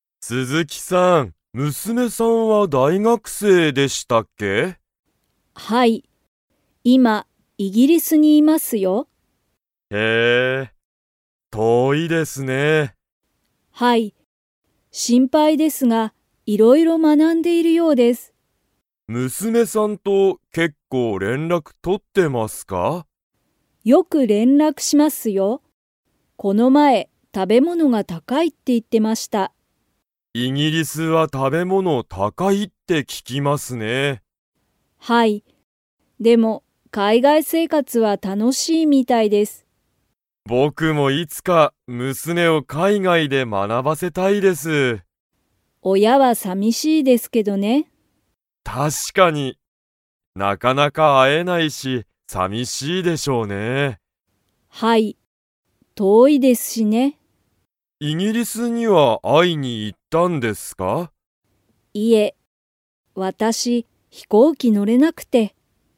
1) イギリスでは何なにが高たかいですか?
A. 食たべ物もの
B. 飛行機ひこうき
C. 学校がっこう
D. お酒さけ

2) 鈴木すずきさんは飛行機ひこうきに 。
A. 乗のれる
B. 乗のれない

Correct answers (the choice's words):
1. 食たべ物もの
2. 乗のれない

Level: Level 4